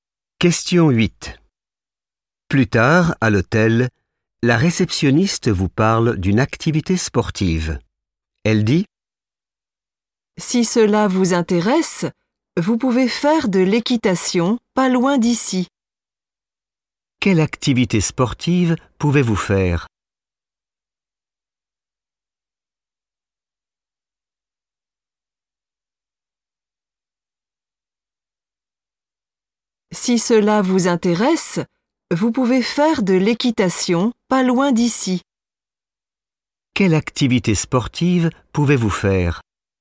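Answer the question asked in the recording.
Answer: l'équitation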